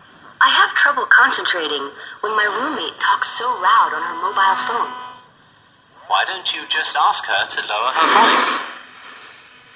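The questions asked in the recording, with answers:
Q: What does the man suggest the woman do?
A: Ask her roommate to lower her voice.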